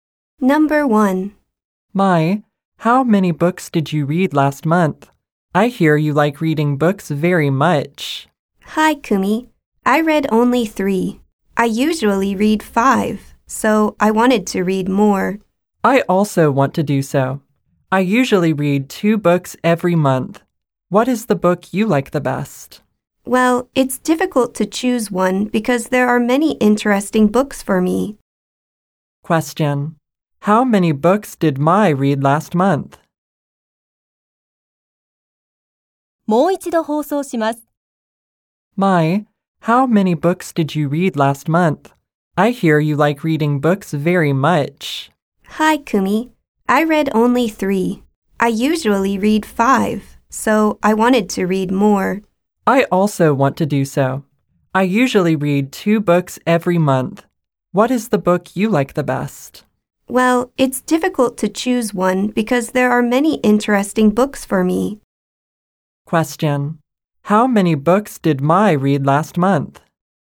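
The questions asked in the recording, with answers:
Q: How many books did Mai read last month?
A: Three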